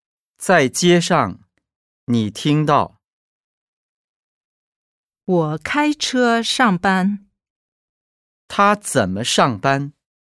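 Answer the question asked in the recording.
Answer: 开车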